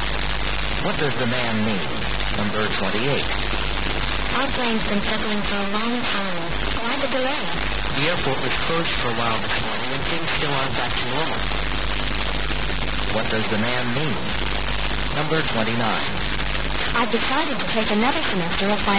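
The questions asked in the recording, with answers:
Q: What does the man mean?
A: The delay is because the airport was closed earlier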